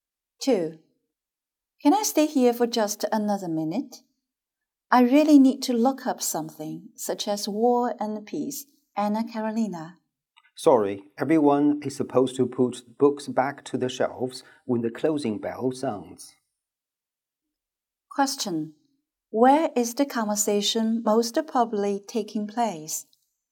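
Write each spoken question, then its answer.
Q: Where is the conversation most probably taking place?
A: In a library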